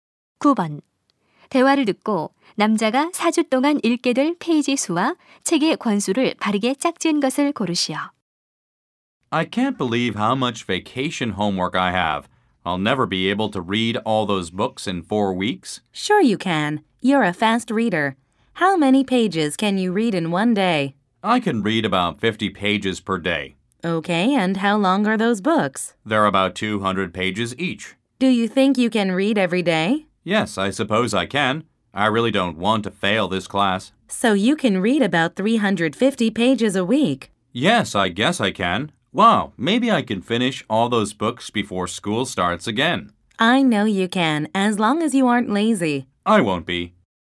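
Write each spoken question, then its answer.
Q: 대화를 듣고 남자가 4주 동안 읽게 될 페이지 수와 책의 권수를 바르게 짝지은 것을 고르시오.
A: 1,400페이지, 7권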